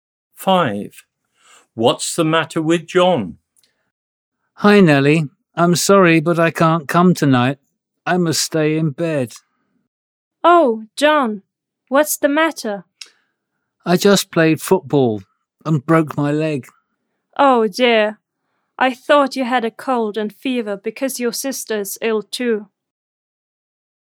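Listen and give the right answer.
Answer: he broke his leg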